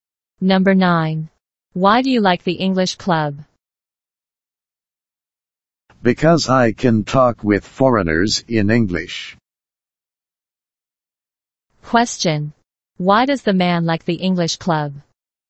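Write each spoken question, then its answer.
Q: Why does the man like the English club?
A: Because he can talk with foreigners in English.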